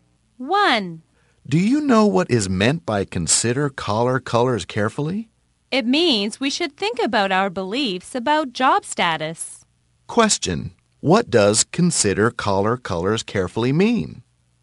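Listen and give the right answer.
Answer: We should think about our beliefs about job status.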